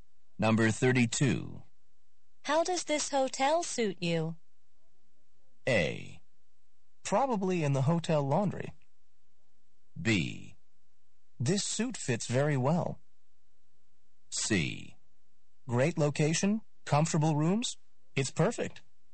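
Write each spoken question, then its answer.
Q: How does this hotel suit you?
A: C: Great location, comfortable rooms. It's perfect.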